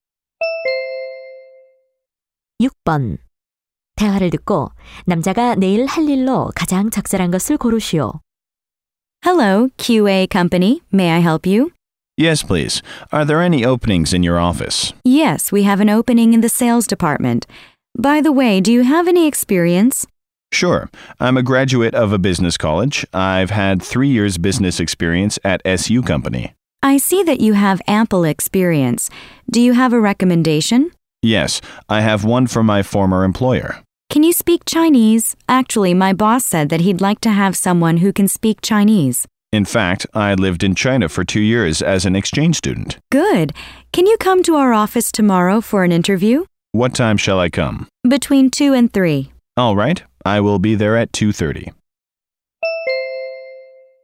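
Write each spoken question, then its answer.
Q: 대화를 듣고 남자가 내일 할 일로 가장 적절한 것을 고르시오.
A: 면접 보러 가기 (2시 30분)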